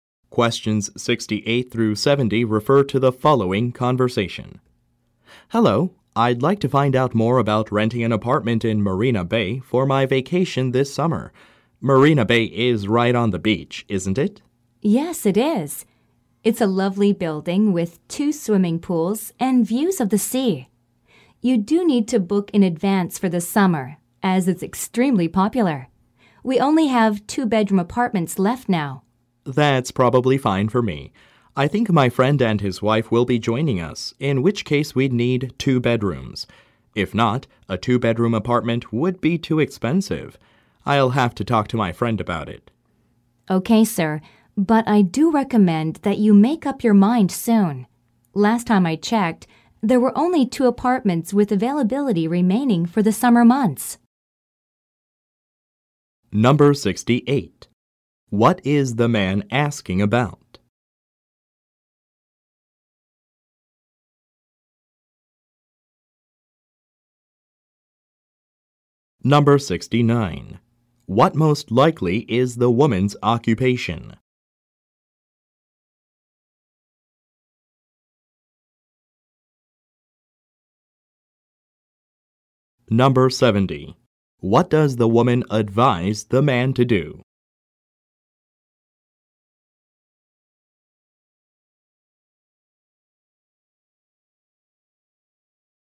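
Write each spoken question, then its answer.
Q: What is the man asking about?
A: Renting an apartment in Marina Bay for a summer vacation

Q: What does the woman advise the man to do?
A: Make a decision and book soon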